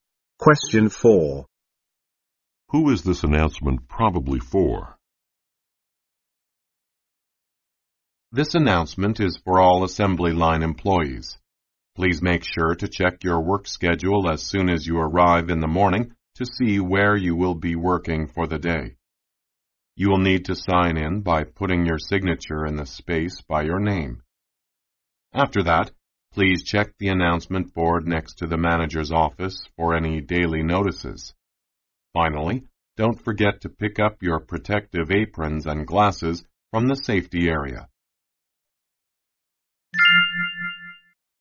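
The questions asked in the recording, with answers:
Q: Who is this announcement probably for?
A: Assembly line employees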